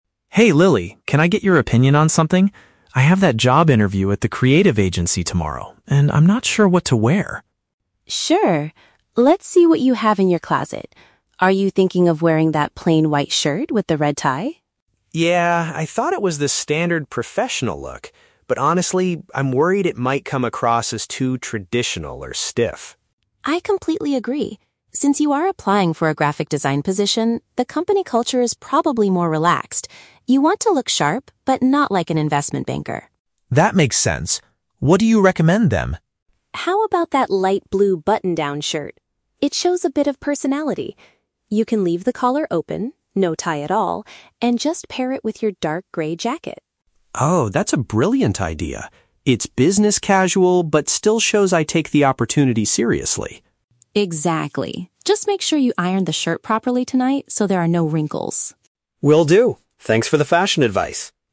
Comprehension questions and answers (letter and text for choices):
Listen to a conversation between a brother and sister. Choose the best answer (A, B, or C) for each question.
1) Why is Mark asking his sister for help?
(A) He wants her to press and iron his clothes.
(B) He needs advice on appropriate attire for an appointment.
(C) He wants to borrow some money to buy a new suit.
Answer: (B) He needs advice on appropriate attire for an appointment.

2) What is Mark's concern about his original outfit choice?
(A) He fears it makes him look too conservative.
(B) He thinks the white shirt is no longer clean.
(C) He feels the red tie does not match his jacket.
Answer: (A) He fears it makes him look too conservative.

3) What final outfit do they agree on for the interview?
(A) A white shirt worn with a colorful necktie.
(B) A pale blue shirt under a coat, without a tie.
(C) A completely casual t-shirt and a pair of jeans.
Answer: (B) A pale blue shirt under a coat, without a tie.

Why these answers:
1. Mark asks for Lily's opinion because he has a "job interview" tomorrow and is "not sure what to wear." Paraphrasing: what to wear = appropriate attire; job interview = appointment.
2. Mark is worried that his white shirt and red tie might come across as "too traditional or stiff." Lily agrees he shouldn't look like an "investment banker." Paraphrasing: traditional or stiff = conservative.
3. Lily suggests the "light blue button-down shirt," pairing it with a "dark grey jacket" and explicitly says "no tie at all." Mark agrees this is a brilliant idea. Paraphrasing: light blue = pale blue; jacket = coat.

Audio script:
Mark: Hey Lily, can I get your opinion on something? I have that job interview at the creative agency tomorrow, and I'm not sure what to wear.
Lily: Sure. Let's see what you have in your closet. Are you thinking of wearing that plain white shirt with the red tie?
Mark: Yeah, I thought it was the standard professional look. But honestly, I'm worried it might come across as too traditional or stiff.
Lily: I completely agree. Since you are applying for a graphic design position, the company culture is probably more relaxed. You want to look sharp, but not like an investment banker.
Mark: That makes sense. What do you recommend then?
Lily: How about that light blue button-down shirt? It shows a bit of personality. You can leave the collar open—no tie at all—and just pair it with your dark grey jacket.
Mark: Oh, that's a brilliant idea. It's business casual but still shows I take the opportunity seriously.
Lily: Exactly. Just make sure you iron the shirt properly tonight so there are no wrinkles.